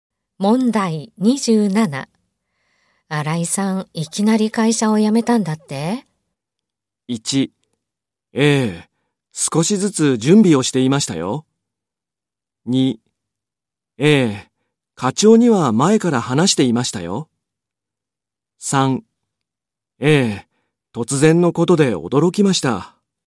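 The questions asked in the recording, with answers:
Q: 新井さん、いきなり会社を辞めたんだって?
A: 3: ええ、突然のことで驚きました。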